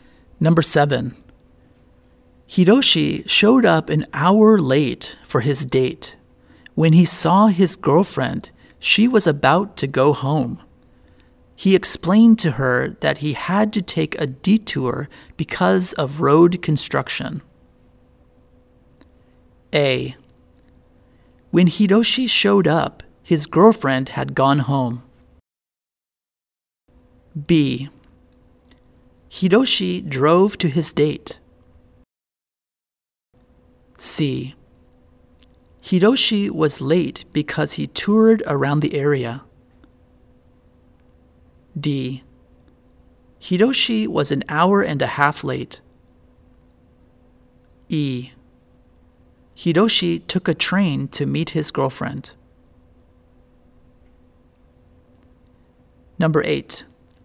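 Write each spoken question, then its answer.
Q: Hiroshi showed up an hour late for his date.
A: B: Hiroshi drove to his date.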